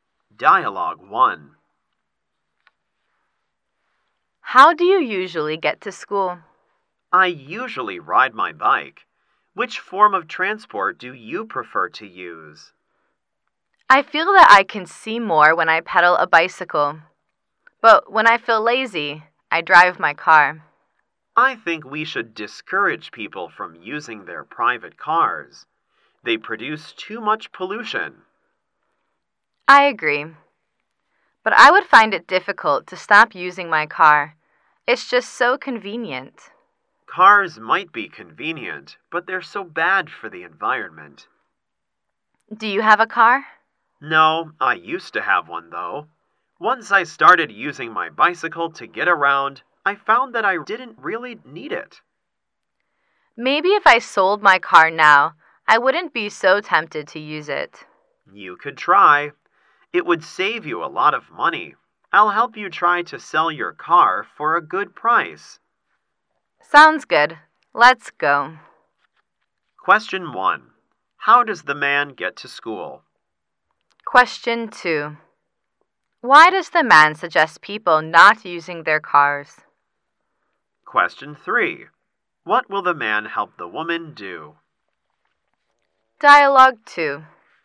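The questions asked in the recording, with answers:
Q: Why does the man suggest people not using their cars?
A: Cars produce too much pollution.

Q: What will the man help the woman do?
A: Sell her car for a good price.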